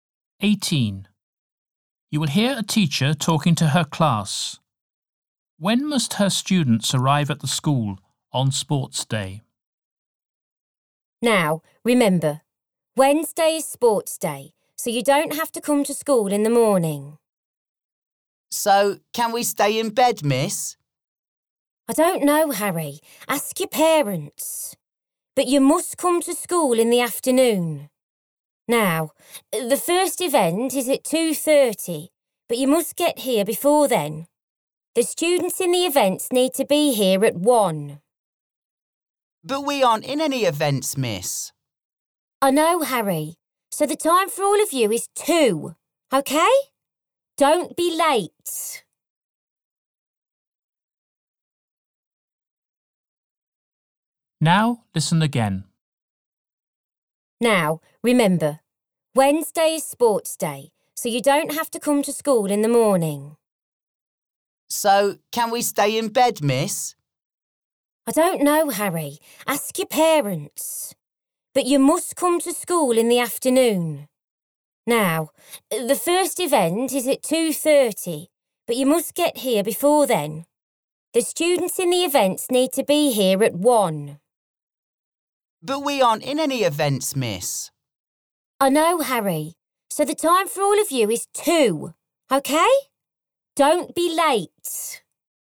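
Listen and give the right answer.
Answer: At 2 o'clock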